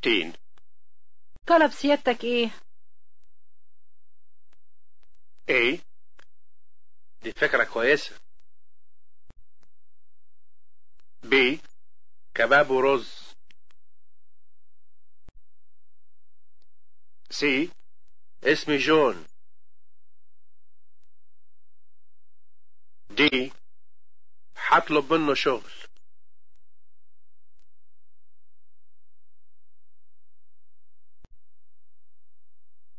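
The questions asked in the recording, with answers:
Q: طلب سيادتك ايه؟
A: B: كباب ورز.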